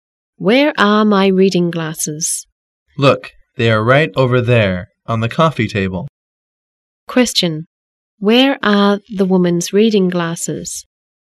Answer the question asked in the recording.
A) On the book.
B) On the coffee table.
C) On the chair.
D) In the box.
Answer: B) On the coffee table.

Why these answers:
W: Where are my reading glasses? M: Look, they are right over there, on the coffee table. Q: Where are the woman's reading glasses?